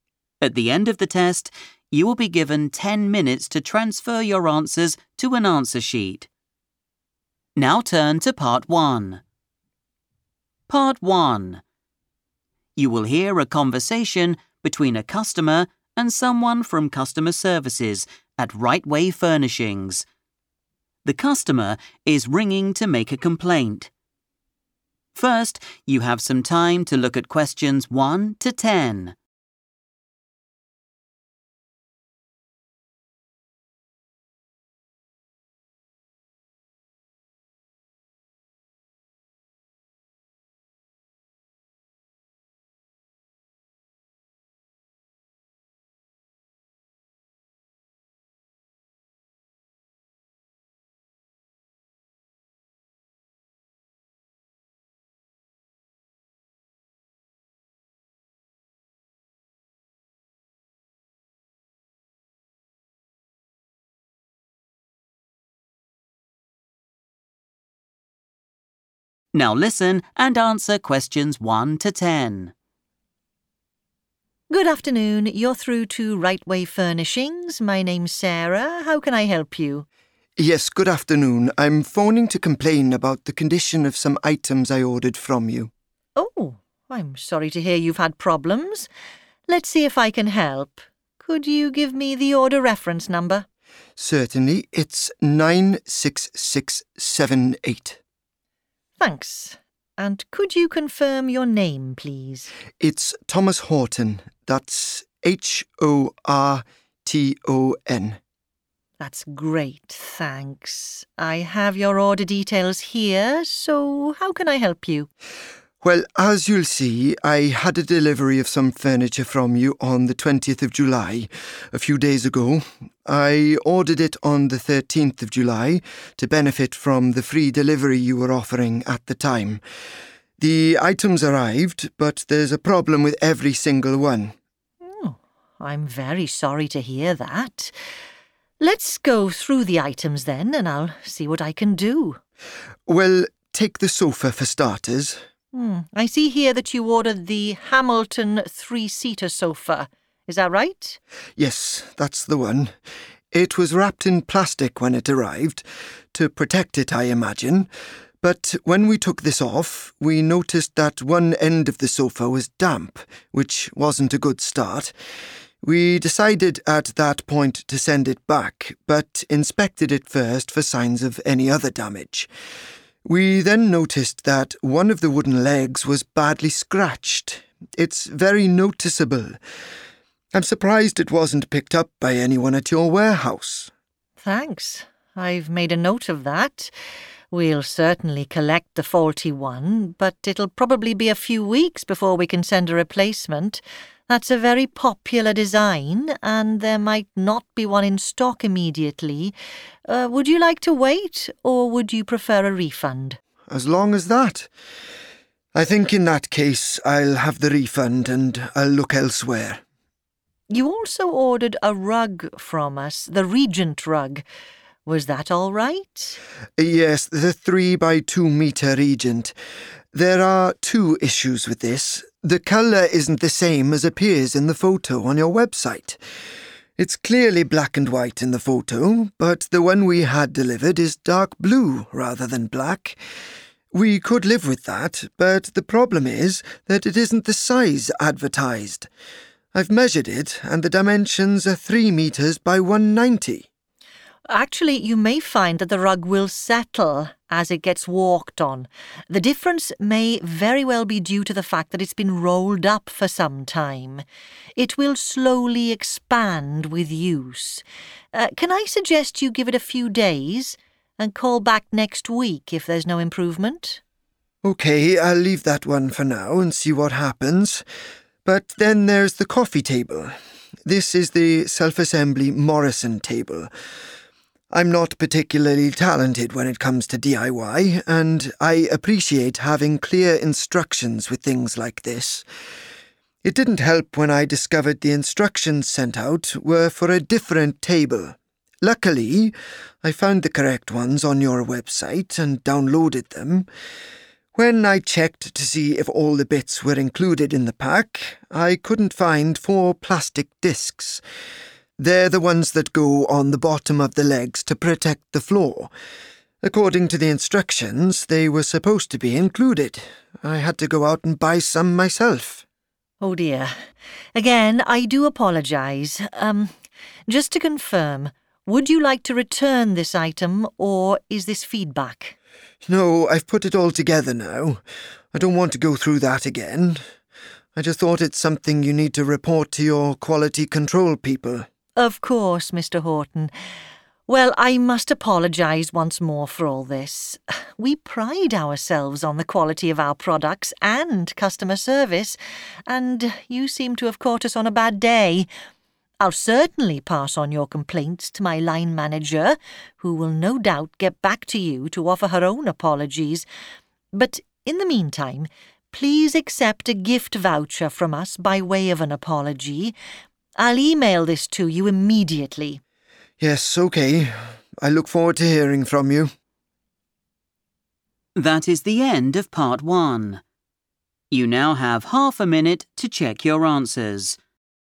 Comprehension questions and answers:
Complete the form below. Write NO MORE THAN TWO WORDS AND/OR A NUMBER for each answer.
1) Order reference number:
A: 96678

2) Customer name: Thomas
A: Horton

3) Date order placed:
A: 13th July / 13th of July / 13 July / July 13th / July 13

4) Part of the sofa was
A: damp

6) Wrong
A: colour / color

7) Customer to telephone back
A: next week

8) The four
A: plastic discs / plastic disks

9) Report issue to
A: quality control

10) Additional notes: Send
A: gift voucher

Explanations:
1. The correct answer is identified when Sarah asks Thomas for the 'order reference' so she can look up his file. Thomas immediately provides the number 96678, which Sarah then uses to access his order details.
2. The correct answer is Horton because when the staff member, Sarah, asks for the customer's name to check his order details, he identifies himself as Thomas Horton and even spells out the last name.
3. The correct answer is 13th July because Thomas explicitly states this was the day he placed the order. In the conversation, he mentions two different dates: July 20th, which was the day it arrived (delivery), and July 13th, which was the day he bought the items to get a special offer. Since the form asks for the date the order was placed, 13th July is the right information to use.
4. The correct answer is confirmed by the transcript where Thomas describes the condition of the Hamilton three-seater sofa. He mentions that after taking off the protective plastic wrap, he found that one end of the sofa was wet or "damp," which was the first of two problems he found with that specific item.
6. The correct answer is "colour" because Thomas points out two problems with the Regent rug. The first issue he mentions is that the rug he received does not match the picture he saw online in terms of its appearance. Specifically, he says the website showed it as black and white, but the one delivered to him is dark blue. Therefore, the item's colour is wrong.
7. The correct answer is next week because the customer service representative, Sarah, explains that the rug might be smaller than expected because it was tightly rolled. She advises Thomas to wait a few days for it to expand and then get in touch with them again during the following week if it is still not the correct size.
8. The correct answer is 'plastic discs' because Thomas explains that while he was checking the items in the box for the Morrison coffee table, he realized four parts were not there. He says he 'couldn't find' them, which means they were 'missing' from the delivery. These items were supposed to be put on the table legs but were not included in the pack.
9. The correct answer is derived from Thomas's suggestion regarding the missing parts for the Morrison coffee table. After explaining that he had already assembled the table and didn't want to return it, he stated that the issue should be reported to the 'quality control' people. In a business context, the 'Team' mentioned in the form is synonymous with the 'people' Thomas refers to who handle product standards.
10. The correct answer is 'gift voucher' because Sarah, the store worker, says she will send one to Thomas at the end of their conversation. She offers this to say sorry for all the problems Thomas had with his furniture order and tells him she will email it to him right away.

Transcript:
Sarah: Good afternoon. You're through to Right way Furnishings. My name's Sarah. How can I help you?
Thomas: Yes, good afternoon. I'm phoning to complain about the condition of some items I ordered from you.
Sarah: Oh, I'm sorry to hear you've had problems. Let's see if I can help. Could you give me the order reference
Thomas: Certainly. It's 96678.
Sarah: Thanks. And could you confirm your name, please?
Thomas: It's Thomas Horton. That's H-O-R-T-O-N.
Sarah: That's great, thanks. I have your order details here so how can I help you?
Thomas: Well, as you'll see, I had a delivery of some furniture from you on the 20th of July, a few days ago. I ordered it on the 13th of July to benefit from the free delivery you were offering at the time. The items arrived but there's a problem with every single one.
Sarah: I'm very sorry to hear that. Let's go through the items, then, and I'll see what I can do.
Thomas: Well, take the sofa for starters.
Sarah: I see here thatyou ordered the Hamilton three-seater sofa. Is that right?
Thomas: Yes, that's the one. It was wrapped in plastic when it arrived – to protect it, I imagine, but when we took this off, we noticed that one end of the sofa was damp, which wasn't a good start. We decided at that point to send it back but inspected it first for signs of any other damage. We then noticed that one of the wooden legs was badly scratched. It's very noticeable. I'm surprised it wasn't picked up by anyone at your warehouse.
Sarah: Thanks. I've made a note of that. We'll certainly collect the faulty one but it'll probably be a few weeks before we can send a replacement. That's a very popular design and there might not be one in stock immediately. Would you like to wait or would you prefer a refund?
Thomas: As long as that? I think in that case, I'll have the refund and I'll look elsewhere.
Sarah: You also ordered a rug from us, the Regent rug. Was that all right?
Thomas: Yes, the three- by two-metre Regent. There are two issues with this. The colour isn't the same as appears in the photo on your website. It's clearly black and white in the photo but the one we had delivered is dark blue rather than black. We could live with that but the problem is that it isn't the size advertised. I've measured it and the dimensions are three metres by one ninety.
Sarah: Actually, you may find that the rug will settle as it gets walked on. The difference may very well be due to the fact that it's been rolled up for some time. It will slowly expand with use. Can I suggest you give it a few days and call back next week if there's no improvement?
Thomas: OK, I'll leave that one for now and see what happens. But then there's the coffee table. This is the self-assembly Morrison table. I'm not particularly talented when it comes to DIY and I appreciate having clear instructions with things like this. It didn't help when I discovered the instructions sent out were for a different table. Luckily, I found the correct ones on your website and downloaded them. When I checked to see if all the bits were included in the pack, I couldn't find four plastic discs. They're the ones that go on the bottom of the legs to protect the floor. According to the instructions, they were supposed to be included. I had to go out and buy some myself.
Sarah: Oh dear. Again, I do apologise. Just to confirm: would you like to return this item or is this feedback?
Thomas: No, I've put it all together now. I don't want to go through that again. I just thought it's something you need to report to your quality control people.
Sarah: Of course, Mr Horton. Well, I must apologise once more for all this. We pride ourselves on the quality of our products and customer service and you seem to have caught us on a bad day. I'll certainly pass on your complaints to my line manager, who will no doubt get back to you to offer her own apologies. But in the meantime, please accept a gift voucher from us by way of an apology. I'll email this to you immediately.
Thomas: Yes, OK. I look forward to hearing from you.